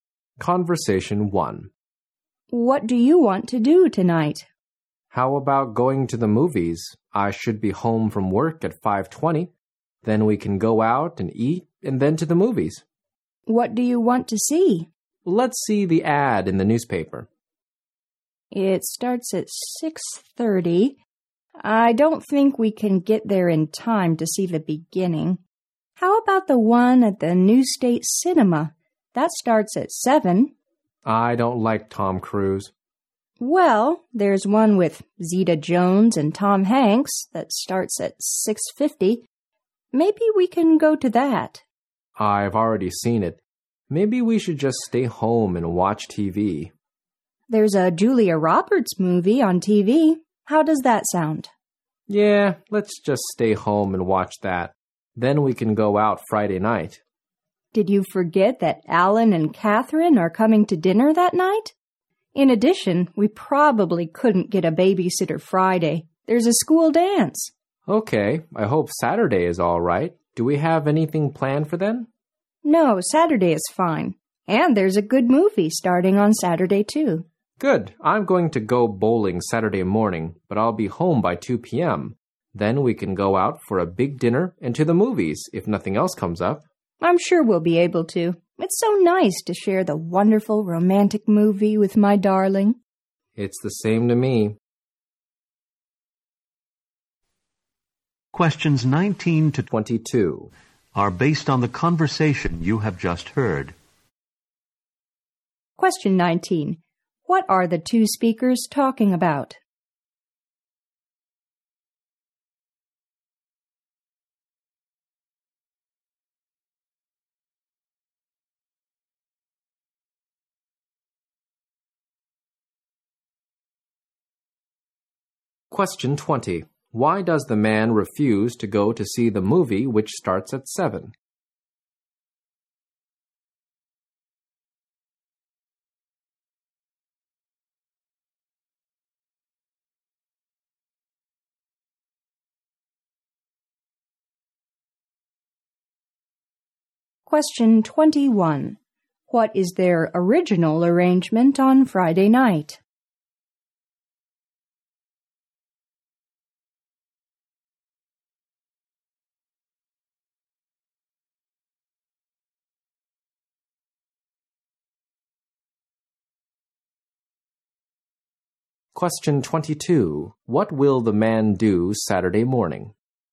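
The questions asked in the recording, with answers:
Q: What are the two speakers talking about?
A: What to do tonight, such as going to a movie

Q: Why does the man refuse to go to see the movie which starts at 7?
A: He doesn't like Tom Cruise.

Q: What is their original arrangement on Friday night?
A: Alan and Catherine are coming to dinner.

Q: What will the man do Saturday morning?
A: Go bowling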